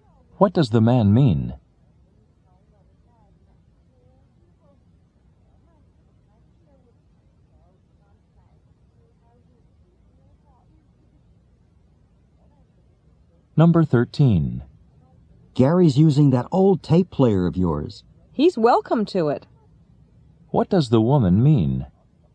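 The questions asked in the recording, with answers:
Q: What does the woman mean?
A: She doesn't mind Gary using the tape player.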